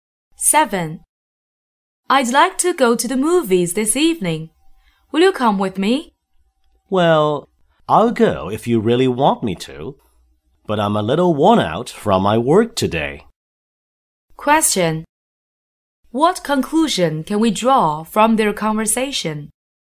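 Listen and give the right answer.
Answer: The man is tired but will go if she insists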